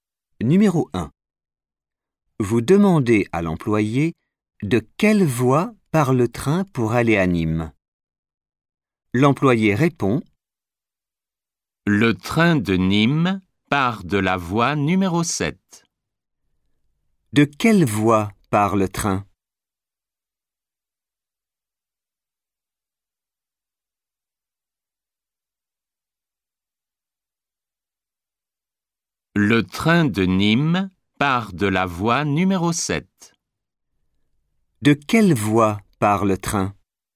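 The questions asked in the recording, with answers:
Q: De quelle voie part le train ?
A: La voie numéro 7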